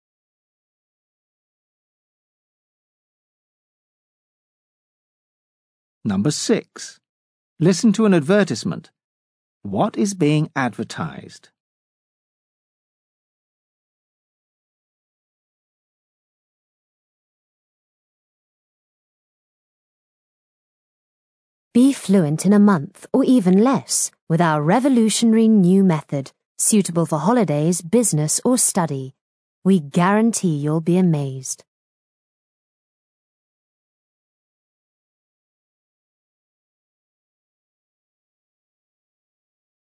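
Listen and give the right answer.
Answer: A language course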